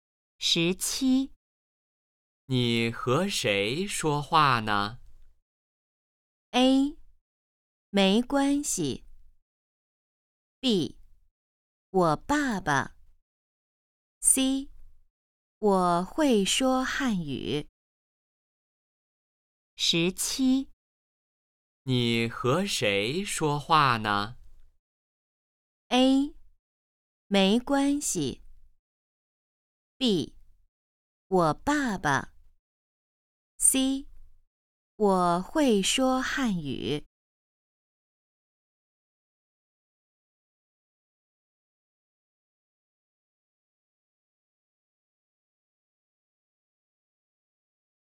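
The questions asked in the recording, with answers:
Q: 你和谁说话呢?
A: B: 我爸爸。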